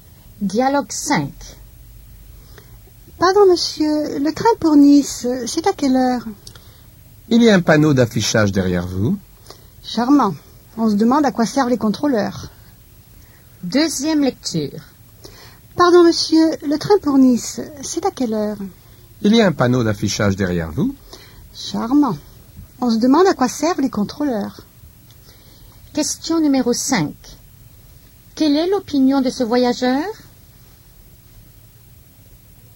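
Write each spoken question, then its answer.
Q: Quelle est l'opinion de ce voyageur?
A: Le contrôleur ne sert à rien et n'est pas aimable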